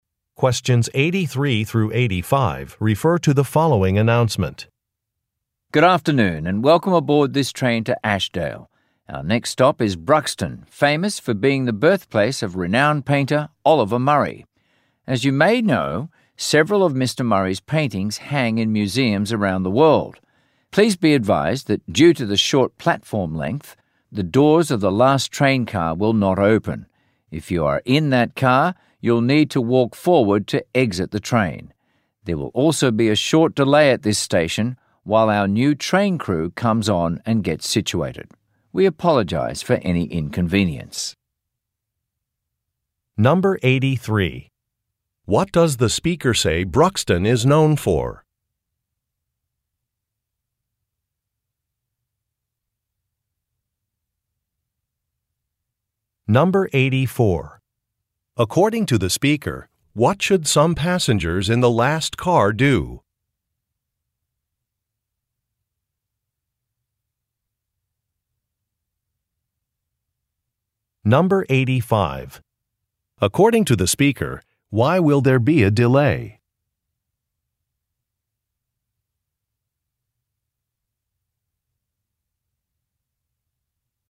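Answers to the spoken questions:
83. Being the birthplace of painter Oliver Murray
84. Walk forward to exit the train
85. A new train crew is coming on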